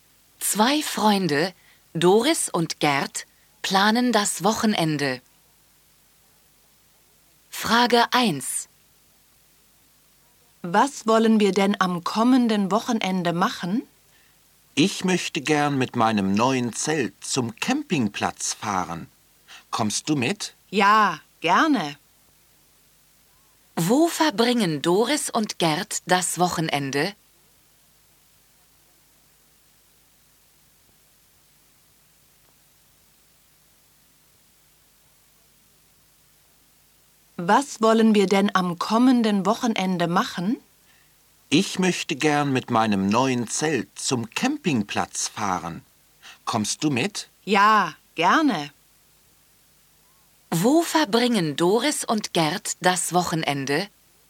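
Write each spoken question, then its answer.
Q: Wo verbringen Doris und Gerd das Wochenende?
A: Auf dem Campingplatz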